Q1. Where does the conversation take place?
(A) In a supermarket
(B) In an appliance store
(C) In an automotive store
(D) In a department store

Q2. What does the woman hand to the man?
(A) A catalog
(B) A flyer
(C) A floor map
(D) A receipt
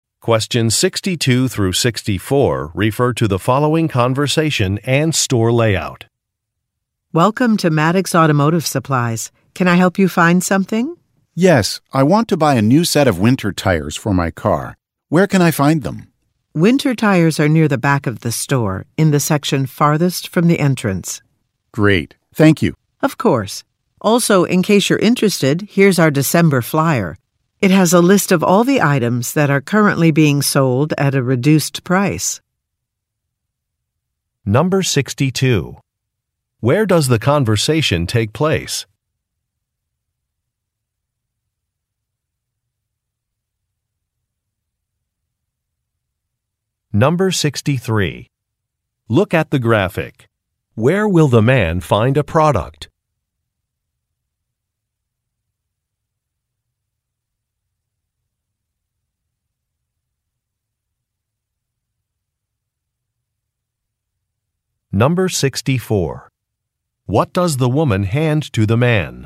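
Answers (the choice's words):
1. In an automotive store
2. A flyer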